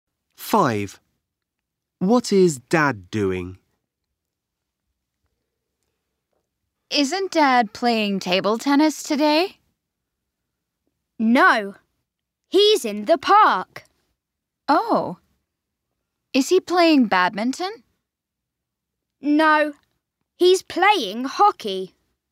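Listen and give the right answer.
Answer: He's playing hockey in the park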